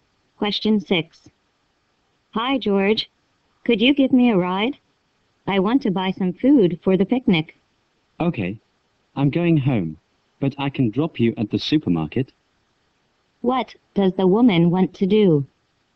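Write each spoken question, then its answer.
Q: What does the woman want to do?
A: Buy food for the picnic at the supermarket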